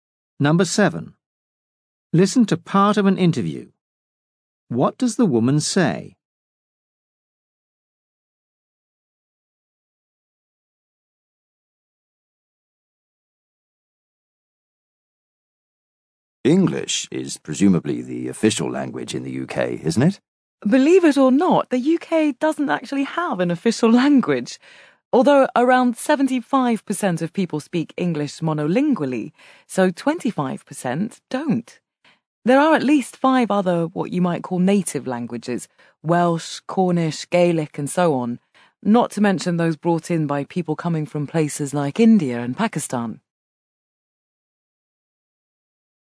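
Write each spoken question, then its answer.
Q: What does the woman say?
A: The UK has no official language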